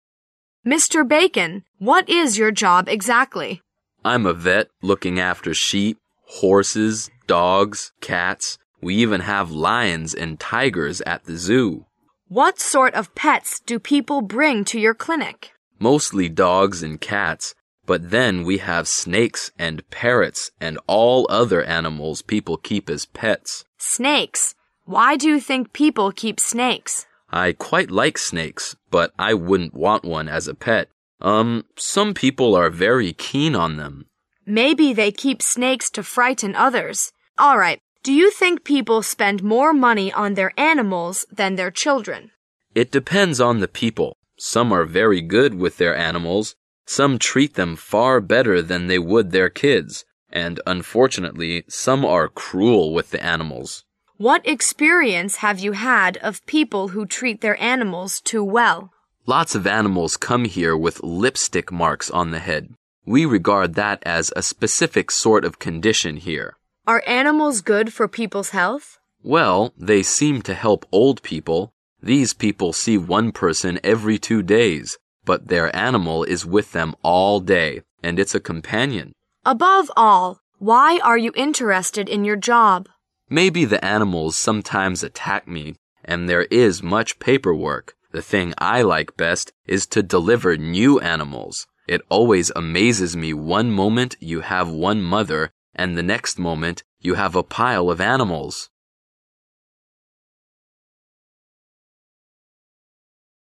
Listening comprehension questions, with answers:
Questions 1 to 4 are based on the following conversation. At the end of the conversation, you will be given 20 seconds to answer the questions. Now, listen to the conversation.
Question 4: According to Mr. Bacon, the best part of his job is______.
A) the excitement of having some danger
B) the amount of paper work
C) to have many animals there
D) to help animals give birth to new ones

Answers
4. D) to help animals give birth to new ones

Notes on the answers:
细节题。对话最后谈到了Bacon先生对工作的喜爱:我最喜欢的事就是帮动物接生。虽然"动物可能有时会攻击我,而且还有很多日常工作。"与下句之间没有关联词,但是在意义上是转折关系,不能视为喜爱工作的理由。如果对deliver new animals词组的意思不明确,可以根据后面一句进行猜测。

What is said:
A
[解析] 1-4 Woman: Mr. Bacon, what is your job exactly? Bacon: I'm a vet, looking after sheep, horses, dogs, cats. We even have lions and tigers at the zoo. Woman: What sort of pets do people bring to your clinic? Bacon: Mostly dogs and cats but then we have snakes and parrots and all other animals people keep as pets. Woman: Snakes? Why do you think people keep snakes? Bacon: I quite like snakes, but I wouldn't want one as a pet, urn... (1[A]) some people are very keen on them. Woman: Maybe they keep snakes to frighten others. All right, do you think people spend more money on their animals than their children? Bacon: It depends on the people. Some are very good with their animals, some treat them far better than they would their kids, and unfortunately some are cruel with the animals. Woman: (3[C]) What experience have you had of people who treat their animals too well? Bacon: Lots of animals come here with lipstick marks on the head. We regard that as a specific sort of condition here. Woman: Are animals good for people's health? Bacon: Well, (2[B]) they seem to help old people, These people see one person every two days, but their animal is with them all day, and it's a companion. Woman: Above all, why are you interested in your job? Bacon: Maybe the animals sometimes attack me and there is much paper work. (4[D]) The thing i like best is to deliver new animals. It always amazes me one moment you have one mother and the next moment you can have a pile of animals.

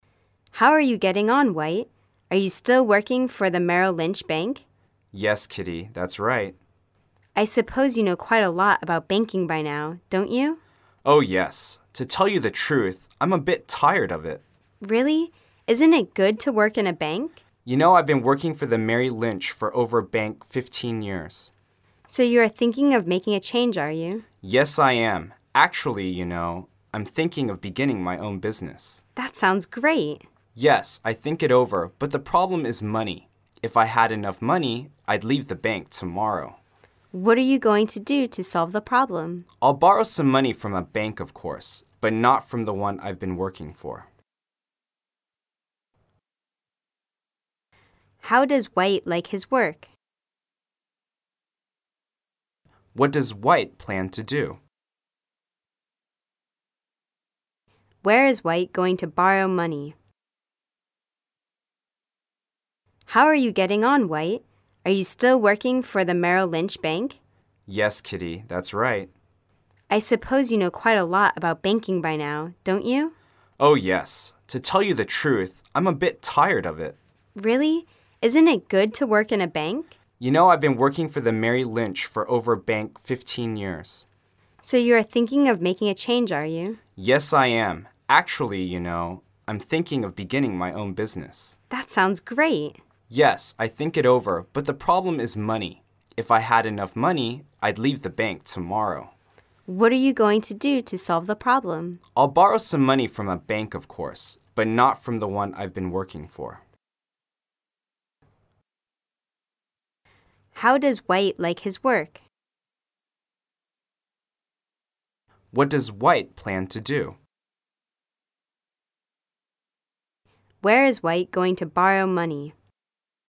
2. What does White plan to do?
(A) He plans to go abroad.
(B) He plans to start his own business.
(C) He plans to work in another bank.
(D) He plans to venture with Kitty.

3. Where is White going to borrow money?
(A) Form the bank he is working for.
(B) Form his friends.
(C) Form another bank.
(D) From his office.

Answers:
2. (B) He plans to start his own business.
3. (C) Form another bank.

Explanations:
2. 该题为细节题,根据文中男士的回答"I'm thinking of beginning my own business."这一关键句可知男士准备自己创业。
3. 该题为细节题,根据文中男士的回答"I'll borrow some money from a bank..., but not from the one I've been working for."这一关键句可知男士准备从别的银行贷款。

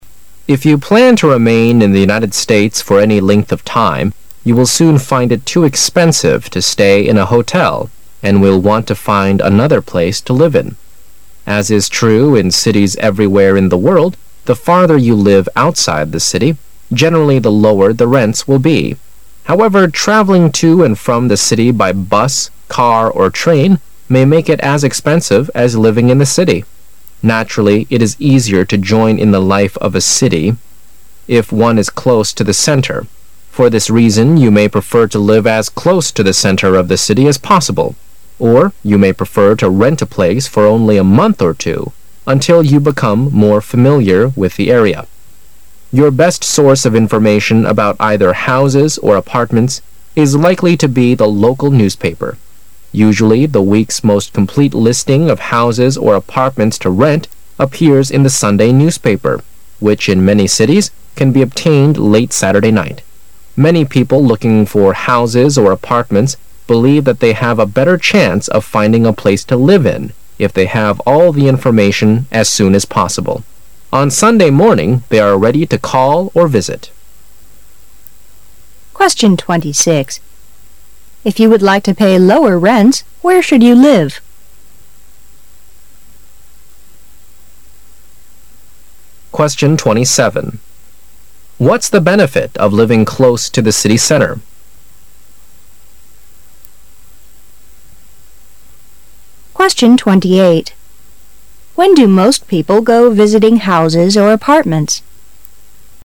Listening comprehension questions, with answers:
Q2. What's the benefit of living close to the city center?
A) Traveling by bus or car.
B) Living in an expensive way.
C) Enjoying city life.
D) Finding places to live in.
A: C) Enjoying city life.

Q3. When do most people go visiting houses or apartments?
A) When they are on holidays.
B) On Sunday mornings.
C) On Saturday night.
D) As soon as they have information.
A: B) On Sunday mornings.

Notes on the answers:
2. 事实细节题。作者在第二段中指出"... it is easier to join in the life of a city if one is close to the center."(如果住在城市的中心的话,就比较容易享受到城市能够为你提供的生活。)所以住在城市里的好处就是C) Enjoying city life.(享受城市生活)。

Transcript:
[解析] 26-28 If you plan to remain in the United States for any length of time, you will soon find it too expensive to stay in a hotel and will want to find another place to live in. As is true in cities everywhere in the world, the farther you live outside the city, generally the lower the rents will he. However, traveling to and from the city by bus, car, or train may make it as expensive as living in the city. Naturally, it is easier to join in the life of a city if one is close to the center. For this reason, you may prefer to live as close to the center of the city as possible. Or, you may prefer to rent a place for only a month or two until you become more familiar with the area. Your best source of information about either houses or apartments is likely to be the local newspaper. Usually, the week's most complete listing of houses or apartments to rent appears in the Sunday newspaper, which in many cities, can be obtained late Saturday night. Many people looking for houses or apartments believe that they have a better chance of finding a place to live in if they have all the information as soon as possible. On Sunday morning, they are ready to call or visit. If you would like to pay lower rents, where should you live?

